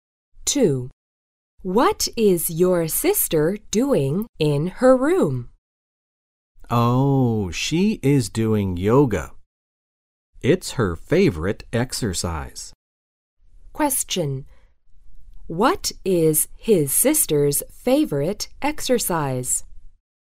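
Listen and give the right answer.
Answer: Yoga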